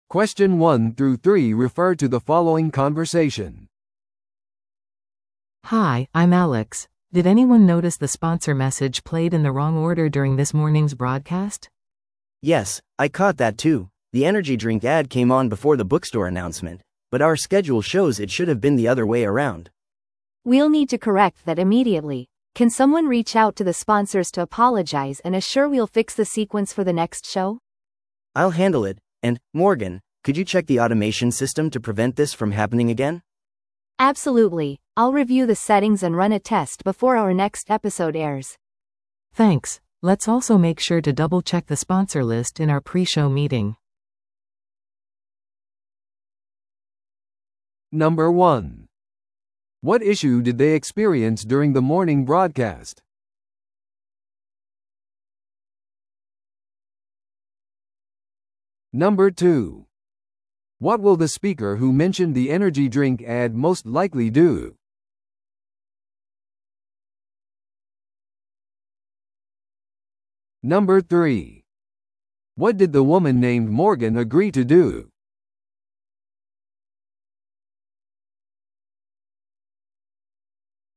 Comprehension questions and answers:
Listen to the audio below and answer the questions.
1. What issue did they experience during the morning broadcast?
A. 自動化システムが動作しなかった。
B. 広告のスケジュールが混乱していた。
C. スポンサーが直前にサポートを撤回した。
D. 番組が予定より遅く始まった。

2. What will the speaker who mentioned the energy drink ad most likely do?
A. 再生システムを更新する。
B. スポンサーに謝罪する。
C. 次回のショーの広告を事前に録音する。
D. 放送時間を再調整する。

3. What did the woman named Morgan agree to do?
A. 直接スポンサーと会う。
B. 自動化システムの設定をレビューする。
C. ショー前に音響機器をチェックする。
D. スポンサーのためにギフトバスケットを準備する。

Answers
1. B. 広告のスケジュールが混乱していた。
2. B. スポンサーに謝罪する。
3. B. 自動化システムの設定をレビューする。

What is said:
A: Hi, I'm Alex. Did anyone notice the sponsor message played in the wrong order during this morning's broadcast?
B: Yes, I caught that too. The energy drink ad came on before the bookstore announcement, but our schedule shows it should have been the other way around.
C: We'll need to correct that immediately. Can someone reach out to the sponsors to apologize and assure we'll fix the sequence for the next show?
B: I'll handle it. And, Morgan, could you check the automation system to prevent this from happening again?
C: Absolutely, I'll review the settings and run a test before our next episode airs.
A: Thanks. Let's also make sure to double-check the sponsor list in our pre-show meeting.

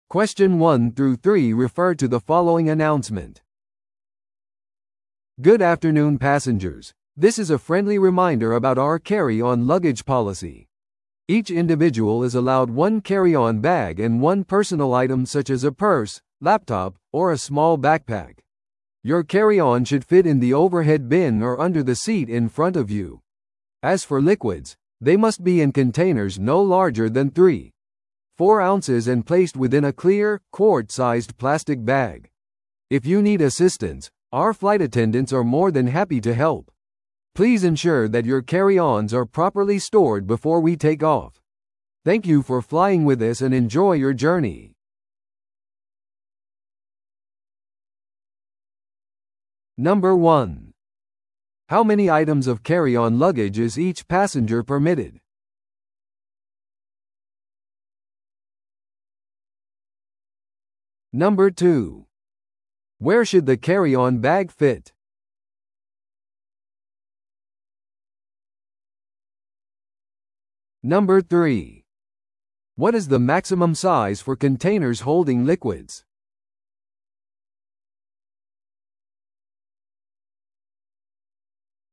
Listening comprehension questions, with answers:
Listen to the audio below and answer the questions.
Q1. How many items of carry-on luggage is each passenger permitted?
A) 手荷物1点のみ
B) 手荷物1点と預け荷物1点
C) 手荷物1点とパーソナルアイテム1点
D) パーソナルアイテム2点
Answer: C) 手荷物1点とパーソナルアイテム1点

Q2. Where should the carry-on bag fit?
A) 指定された荷物収納コンパートメント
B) 座席のポケットに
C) 頭上の収納スペースまたは前の座席の下に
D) 通路に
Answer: C) 頭上の収納スペースまたは前の座席の下に

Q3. What is the maximum size for containers holding liquids?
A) 2.4オンス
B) 3.4オンス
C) 5オンス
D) 制限なしのクオートサイズ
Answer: B) 3.4オンス

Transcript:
Good afternoon passengers, this is a friendly reminder about our carry-on luggage policy. Each individual is allowed one carry-on bag and one personal item such as a purse, laptop, or a small backpack. Your carry-on should fit in the overhead bin or under the seat in front of you. As for liquids, they must be in containers no larger than 3.4 ounces and placed within a clear, quart-sized plastic bag. If you need assistance, our flight attendants are more than happy to help. Please ensure that your carry-ons are properly stored before we take off. Thank you for flying with us and enjoy your journey!

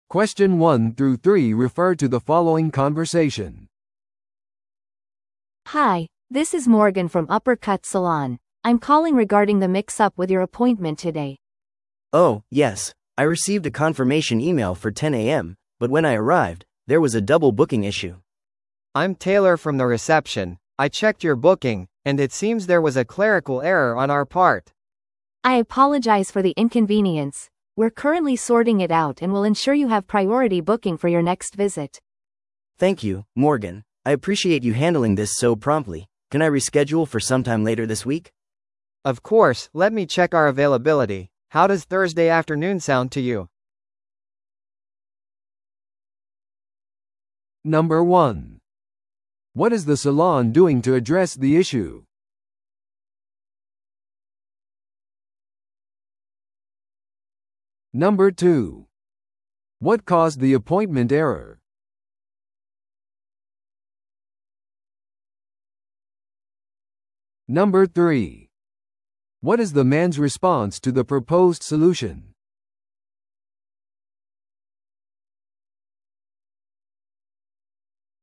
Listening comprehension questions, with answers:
Listen to the audio below and answer the questions.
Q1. What is the salon doing to address the issue?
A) 全額返金を提供する。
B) 無料でヘアカットを行う。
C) 次回の訪問に優先予約を提供する。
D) 顧客のアカウントをキャンセルする。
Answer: C) 次回の訪問に優先予約を提供する。

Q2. What caused the appointment error?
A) 顧客が誤った日付で予約をした。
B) サロン側の手違いがあった。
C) サロンのコンピューターシステムがクラッシュした。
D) 顧客が間違った場所に到着した。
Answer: B) サロン側の手違いがあった。

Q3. What is the man's response to the proposed solution?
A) 彼は怒って他のスタイリストを要求している。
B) 彼は週の後半に予約を変更することを求めている。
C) 彼は別のサロンを探すことに決めた。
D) 彼はマネージャーと話すことを主張している。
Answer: B) 彼は週の後半に予約を変更することを求めている。

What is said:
A: Hi, this is Morgan from Upper Cut Salon. I'm calling regarding the mix-up with your appointment today.
B: Oh, yes. I received a confirmation email for 10 AM, but when I arrived, there was a double-booking issue.
C: I'm Taylor from the reception. I checked your booking, and it seems there was a clerical error on our part.
A: I apologize for the inconvenience. We're currently sorting it out and will ensure you have priority booking for your next visit.
B: Thank you, Morgan. I appreciate you handling this so promptly. Can I reschedule for sometime later this week?
C: Of course, let me check our availability. How does Thursday afternoon sound to you?

